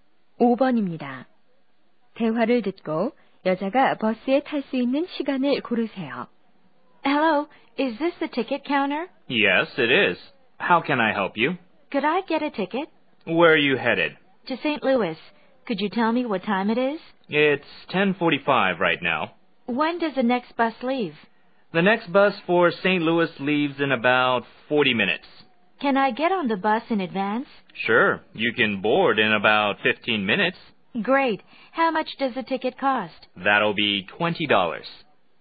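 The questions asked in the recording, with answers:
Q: 대화를 듣고 여자가 버스에 탈 수 있는 시간을 고르세요.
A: 11시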